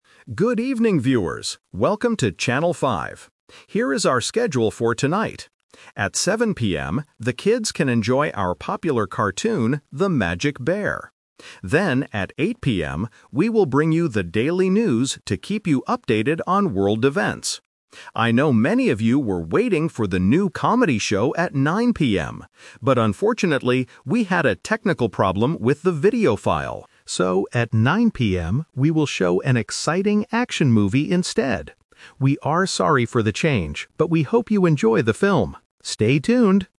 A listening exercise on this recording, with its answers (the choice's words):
Listen to the TV announcement and choose the correct answer (A, B, or C) for each question.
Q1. What program will be on TV at 7:00 PM?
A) The daily news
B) A cartoon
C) A music show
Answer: A cartoon

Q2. What time will the daily news start?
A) 7:00 PM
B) 8:00 PM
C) 9:00 PM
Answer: 8:00 PM

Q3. What will the channel broadcast at 9:00 PM?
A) A comedy show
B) An action movie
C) A sports event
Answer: An action movie

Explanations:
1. The announcer clearly states, "At 7:00 PM, the kids can enjoy our popular cartoon..." Option A is the trap because the news is on at 8:00 PM. Option C is not mentioned.
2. The announcer says, "Then, at 8:00 PM, we will bring you the daily news". Option A is the time for the cartoon. Option C is the time for the movie.
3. The announcer mentions that many people were waiting for a "comedy show" (Option A is the trap), "But unfortunately" there was a technical problem. "So, at 9:00 PM, we will show an exciting action movie instead." Option C is not mentioned.

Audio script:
TV Announcer: Good evening, viewers! Welcome to Channel 5. Here is our schedule for tonight. At 7:00 PM, the kids can enjoy our popular cartoon, The Magic Bear. Then, at 8:00 PM, we will bring you the daily news to keep you updated on world events. I know many of you were waiting for the new comedy show at 9:00 PM. But unfortunately, we had a technical problem with the video file. So, at 9:00 PM, we will show an exciting action movie instead.

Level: A2